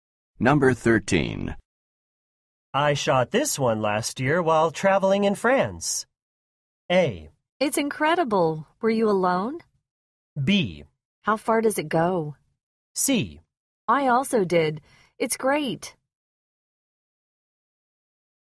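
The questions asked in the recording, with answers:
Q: I shot this one last year while traveling in France.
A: A: It's incredible. Were you alone?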